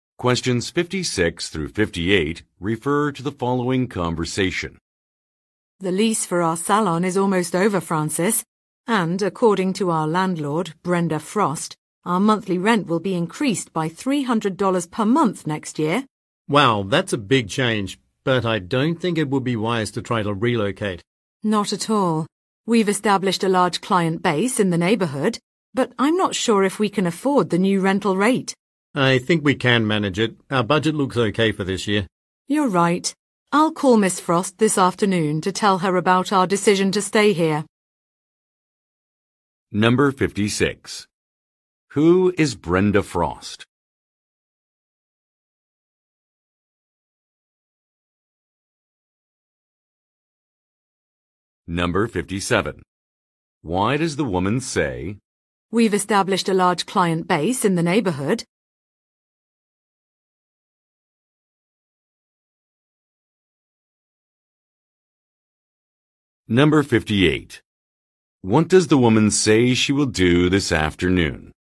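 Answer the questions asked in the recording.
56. The salon's landlord
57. To explain why they should not relocate
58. Call Miss Frost to tell her they will stay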